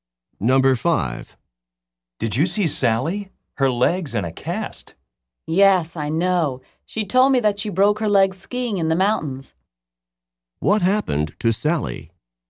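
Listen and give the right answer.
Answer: She broke her leg skiing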